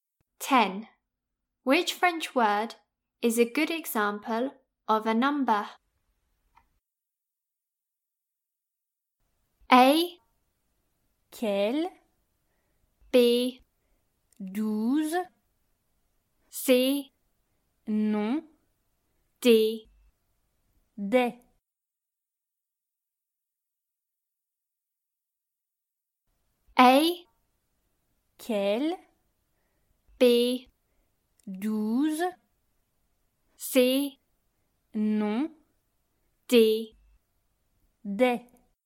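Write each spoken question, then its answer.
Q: Which French word is a good example of a number?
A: B: 12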